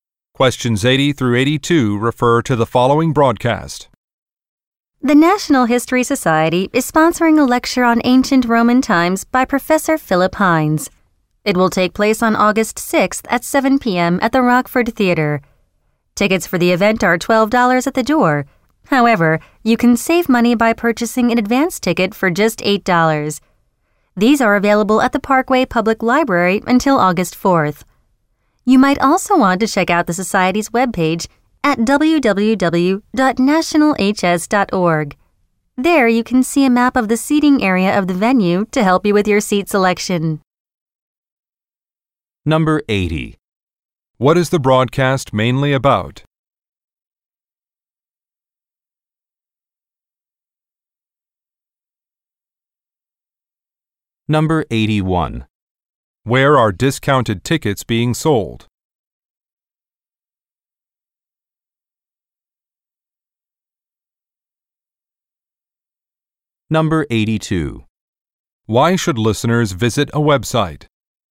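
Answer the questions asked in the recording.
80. A lecture on ancient Rome
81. At the Parkway Public Library
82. To see a seating map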